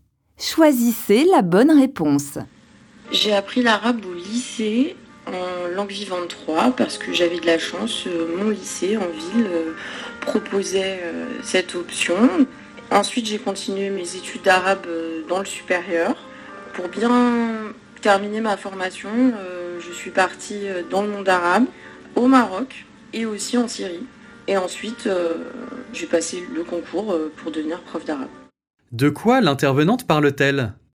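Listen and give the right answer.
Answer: De son parcours d'apprentissage de l'arabe, jusqu'à devenir professeure d'arabe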